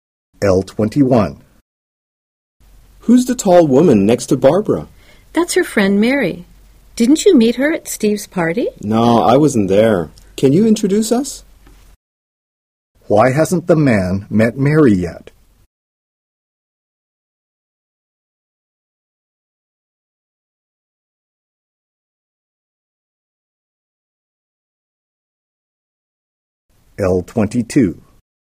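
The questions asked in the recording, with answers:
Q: Why hasn't the man met Mary yet?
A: He wasn't at Steve's party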